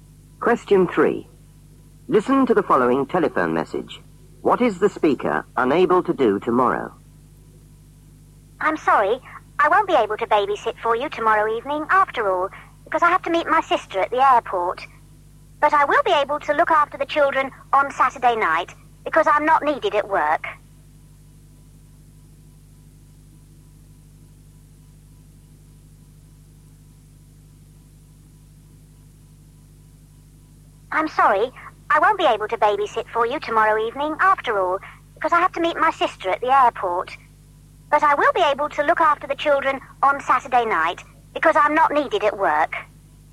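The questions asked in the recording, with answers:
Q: What is the speaker unable to do tomorrow?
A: Babysit tomorrow evening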